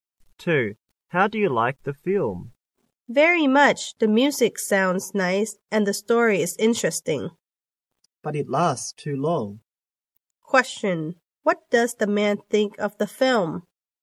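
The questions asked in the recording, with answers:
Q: What does the man think of the film?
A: He likes it very much, but it's too long.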